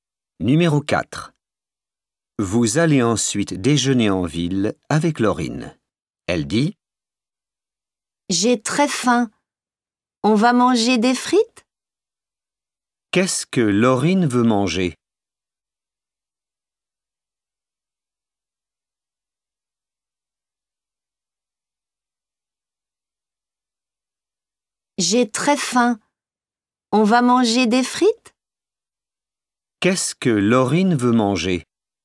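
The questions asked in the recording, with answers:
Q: Qu'est-ce que Laurine veut manger?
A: des frites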